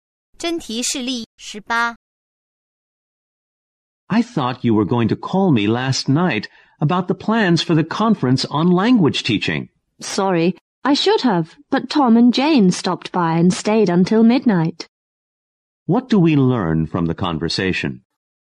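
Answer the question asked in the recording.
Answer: The man didn't call because visitors stayed until midnight.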